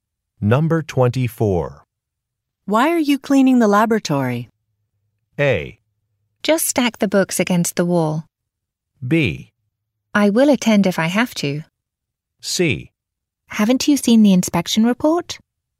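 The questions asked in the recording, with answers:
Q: Why are you cleaning the laboratory?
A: C: Haven't you seen the inspection report?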